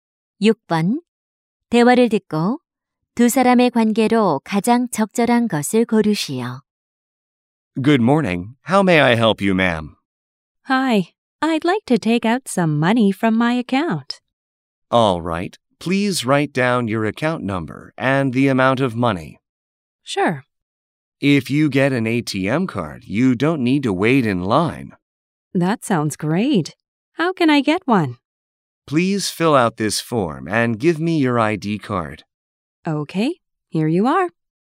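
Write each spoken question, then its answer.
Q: 대화를 듣고 두 사람의 관계로 가장 적절한 것을 고르시오.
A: 은행원과 고객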